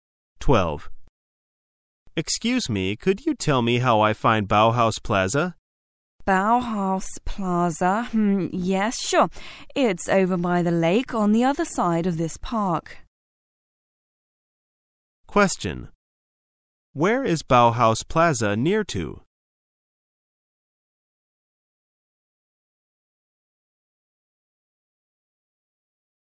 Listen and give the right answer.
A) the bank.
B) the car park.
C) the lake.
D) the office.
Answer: C) the lake.

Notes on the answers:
此题考查听特定信息的能力。解题关键在于听到"by the lake on the other side of this park",排除答案B干扰项。Plaza指"大型购物中心"。